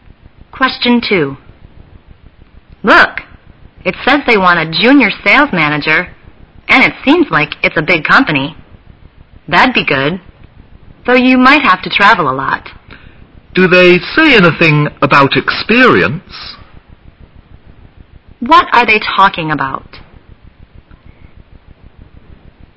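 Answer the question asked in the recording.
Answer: A job advertisement for a junior sales manager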